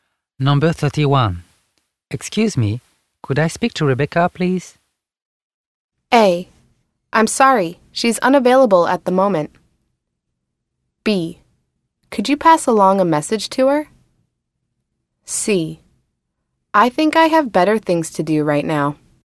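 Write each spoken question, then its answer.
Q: Excuse me, could I speak to Rebecca, please?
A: A: I'm sorry, she's unavailable at the moment.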